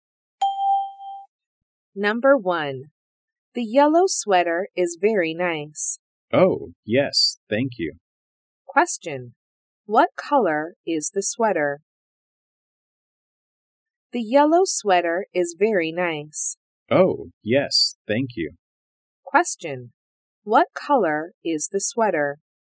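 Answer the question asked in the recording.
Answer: Yellow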